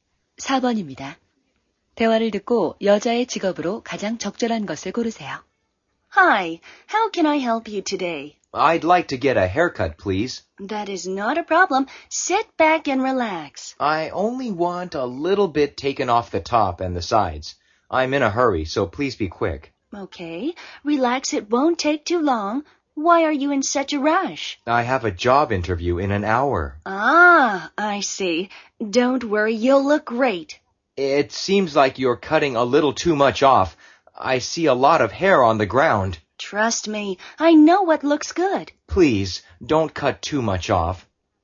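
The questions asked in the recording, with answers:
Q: 대화를 듣고 여자의 직업으로 가장 적절한 것을 고르세요.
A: 미용사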